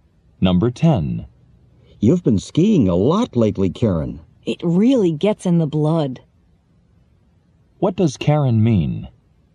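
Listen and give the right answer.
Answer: She has come to love skiing very much.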